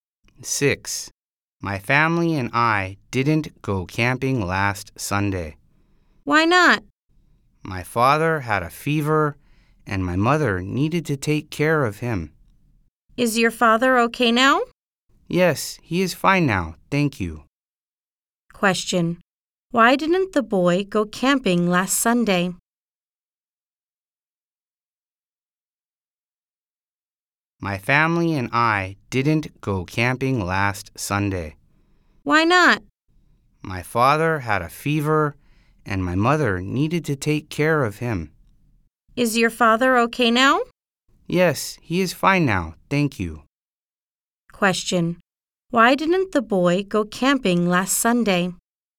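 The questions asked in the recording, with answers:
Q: Why didn't the boy go camping last Sunday?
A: His father had a fever and his mother needed to take care of him.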